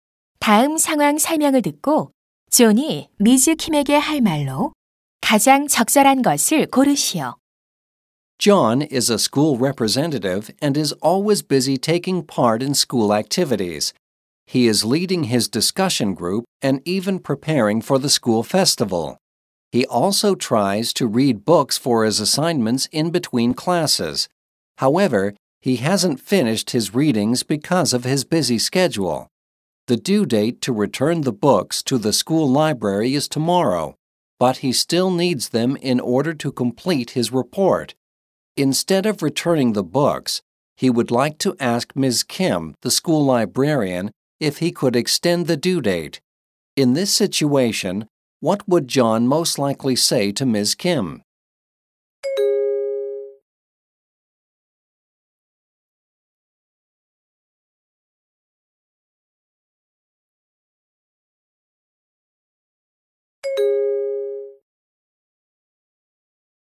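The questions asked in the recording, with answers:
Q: In this situation, what would John most likely say to Ms. Kim?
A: Could I extend the due date for these books?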